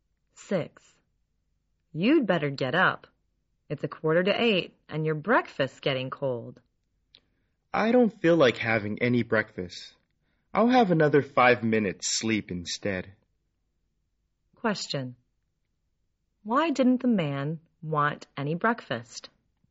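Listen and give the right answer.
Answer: He'd rather sleep another five minutes.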